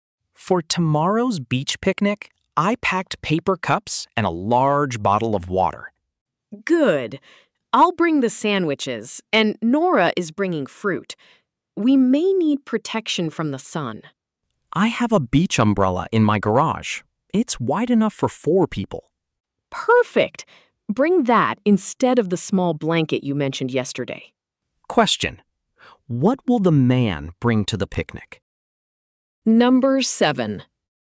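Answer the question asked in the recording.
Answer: A beach umbrella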